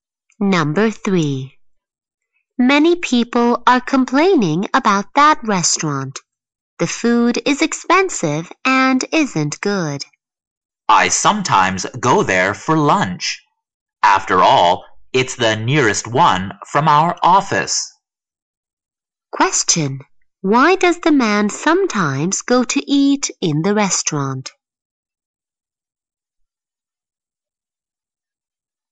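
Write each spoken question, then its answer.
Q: Question. Why does the man sometimes go to eat in the restaurant?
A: It's the nearest one to their office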